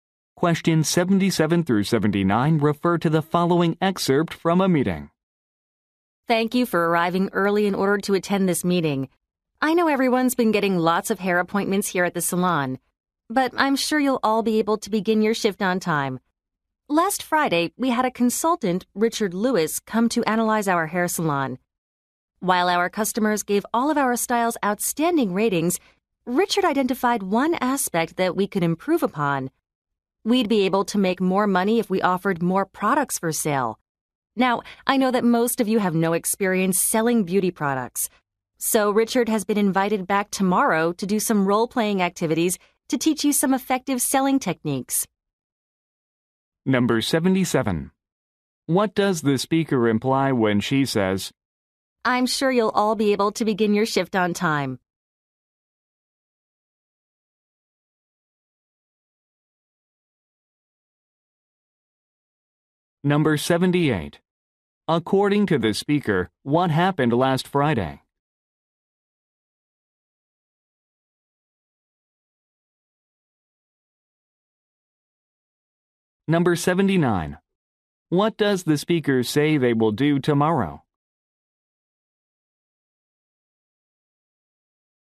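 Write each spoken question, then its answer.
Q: According to the speaker, what happened last Friday?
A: A consultant analyzed the salon

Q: What does the speaker say they will do tomorrow?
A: Do role-playing activities to learn selling techniques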